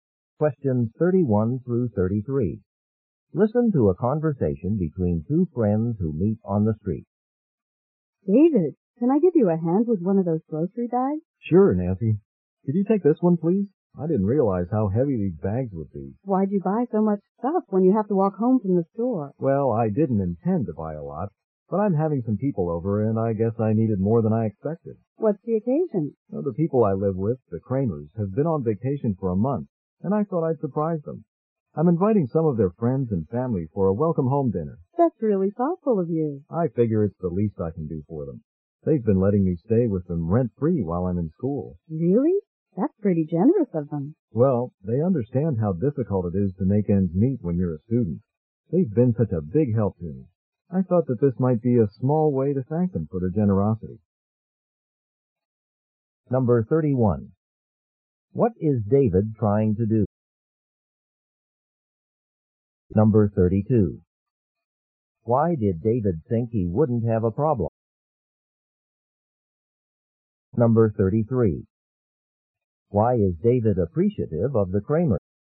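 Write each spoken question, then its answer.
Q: What is David trying to do?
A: Surprise the Kramers with a welcome-home dinner

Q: Why is David appreciative of the Kramer?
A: They let him live with them rent-free while he is in school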